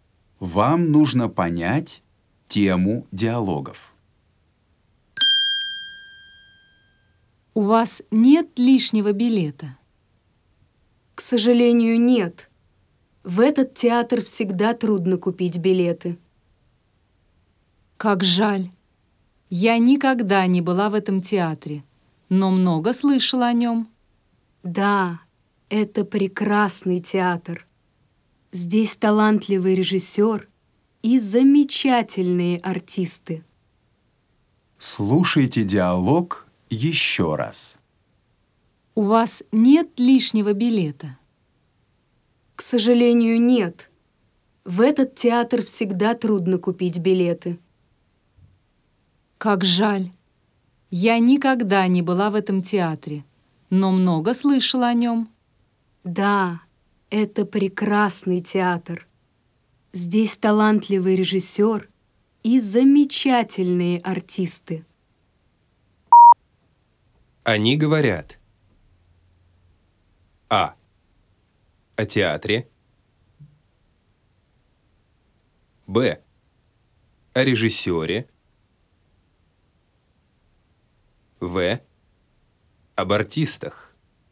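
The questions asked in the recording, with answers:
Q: Они говорят.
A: А: О театре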